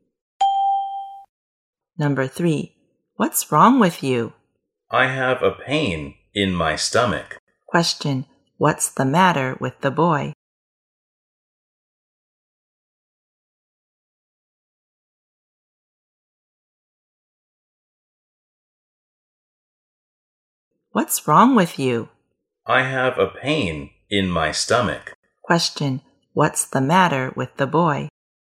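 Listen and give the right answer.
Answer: He has a stomachache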